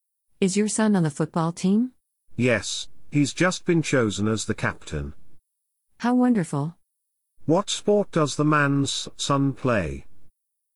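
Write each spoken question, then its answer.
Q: What sport does the man's son play?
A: Football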